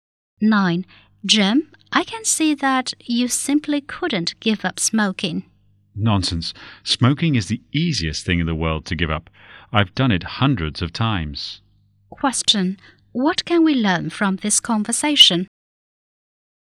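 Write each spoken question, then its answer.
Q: What can we learn from this conversation?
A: Jim has tried to quit smoking many times but failed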